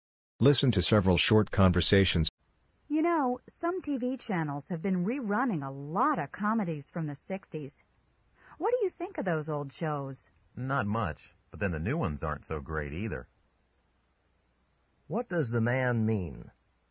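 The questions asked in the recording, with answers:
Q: What does the man mean?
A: He doesn't like either the old shows or the new ones much.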